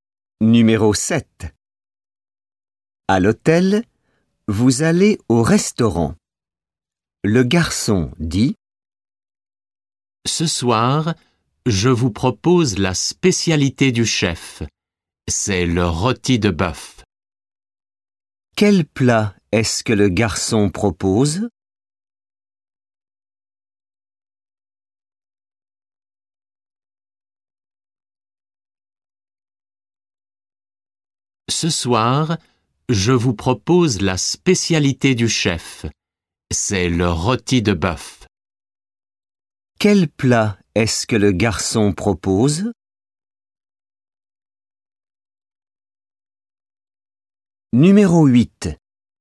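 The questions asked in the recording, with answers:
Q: Quel plat est-ce que le garçon propose?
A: Le rôti de bœuf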